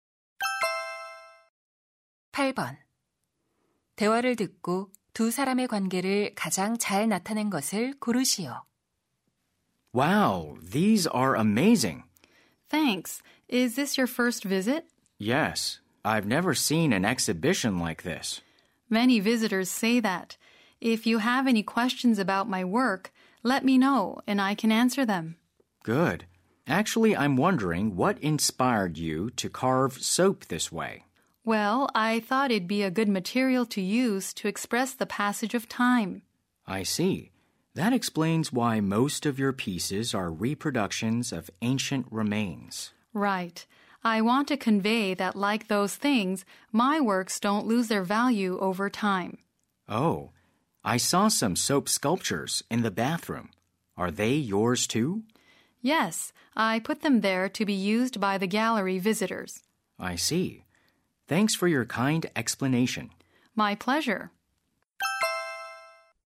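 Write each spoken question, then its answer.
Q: 대화를 듣고 두 사람의 관계를 가장 잘 나타낸 것을 고르시오.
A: 비누 조각가 - 전시회 관람객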